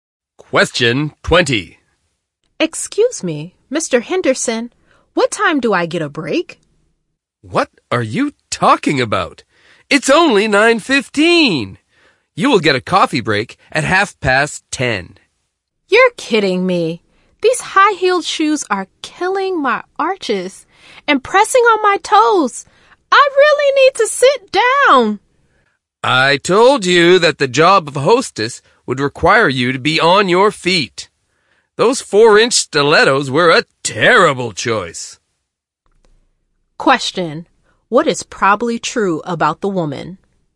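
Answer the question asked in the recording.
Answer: She is a new hostess whose high-heeled shoes are hurting her feet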